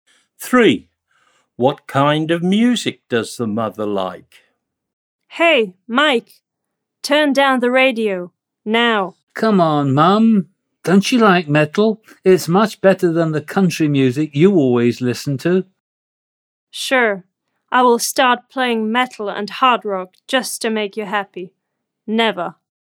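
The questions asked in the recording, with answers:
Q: What kind of music does the mother like?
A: country music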